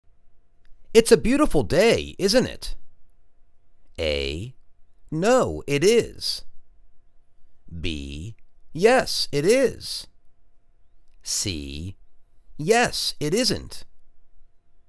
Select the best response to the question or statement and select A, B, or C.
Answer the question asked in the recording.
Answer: Yes it is.